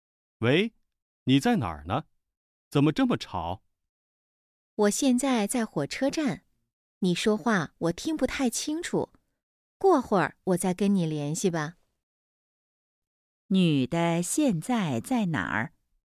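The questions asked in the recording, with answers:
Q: 女的现在在哪儿?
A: 火车站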